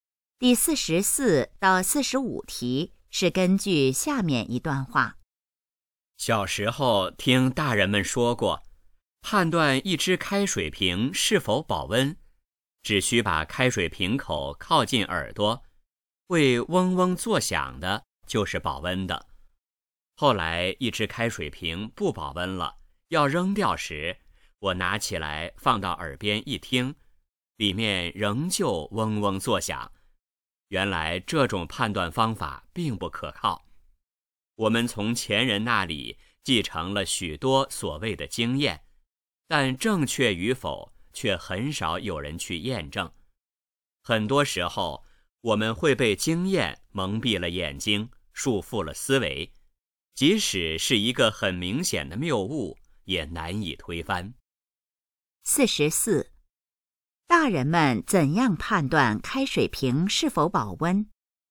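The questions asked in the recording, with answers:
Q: 大人们怎样判断开水瓶是否保温?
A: 把瓶口靠近耳朵,会嗡嗡作响的就是保温的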